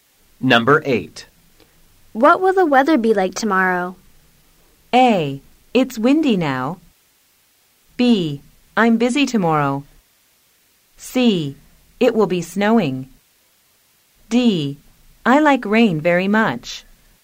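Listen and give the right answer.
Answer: C: It will be snowing.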